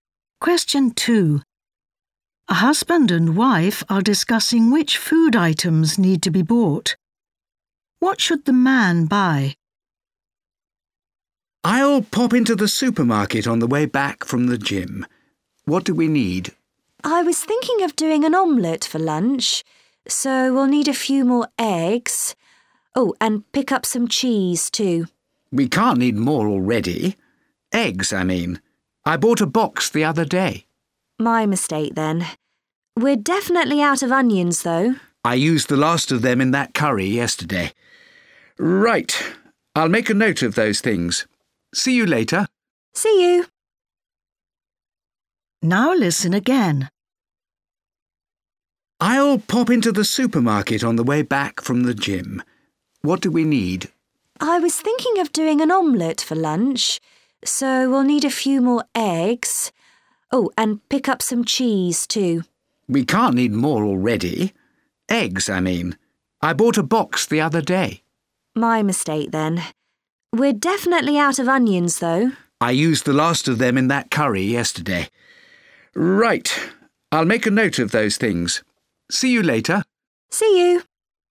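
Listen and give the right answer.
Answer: cheese and onions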